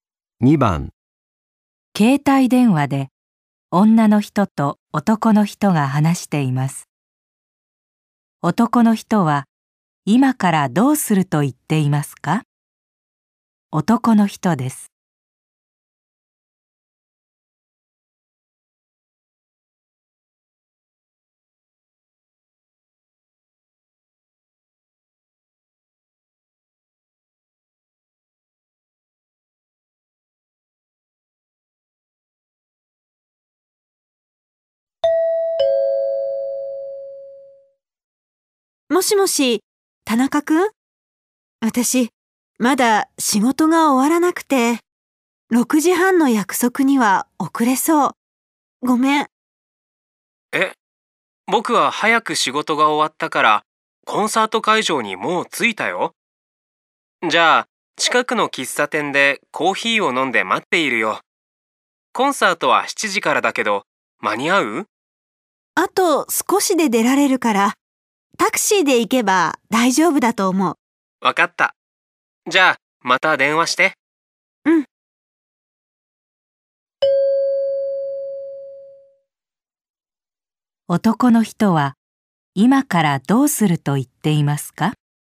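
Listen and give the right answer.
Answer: 近くの喫茶店でコーヒーを飲んで待つ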